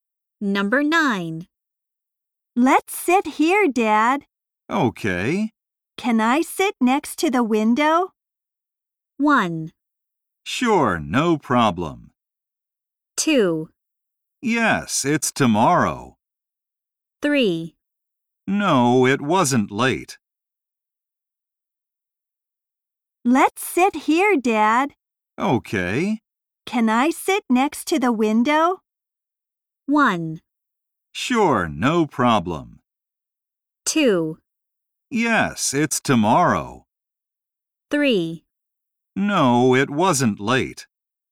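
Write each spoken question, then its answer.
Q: Can I sit next to the window?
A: 1: Sure, no problem.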